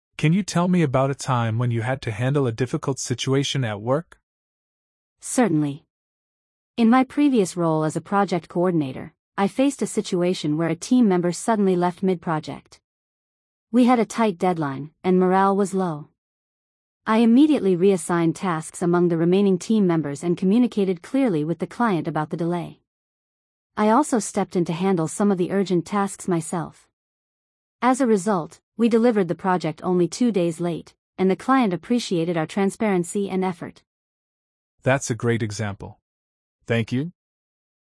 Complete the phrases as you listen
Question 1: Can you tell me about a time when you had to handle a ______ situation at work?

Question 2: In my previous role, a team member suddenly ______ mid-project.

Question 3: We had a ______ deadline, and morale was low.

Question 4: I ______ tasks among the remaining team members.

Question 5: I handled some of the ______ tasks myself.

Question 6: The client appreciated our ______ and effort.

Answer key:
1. difficult
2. left
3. tight
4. reassigned
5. urgent
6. transparency

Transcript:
Interviewer: Can you tell me about a time when you had to handle a difficult situation at work?
Candidate: Certainly. In my previous role as a project coordinator, I faced a situation where a team member suddenly left mid-project. We had a tight deadline, and morale was low. I immediately reassigned tasks among the remaining team members and communicated clearly with the client about the delay. I also stepped in to handle some of the urgent tasks myself. As a result, we delivered the project only two days late, and the client appreciated our transparency and effort.
Perfect! "The client appreciated our transparency and effort."